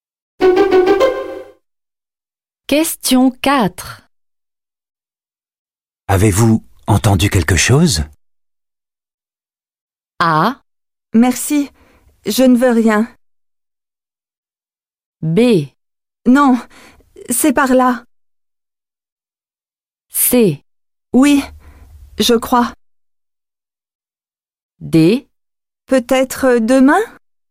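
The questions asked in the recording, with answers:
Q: Avez-vous entendu quelque chose?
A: C: Oui, je crois.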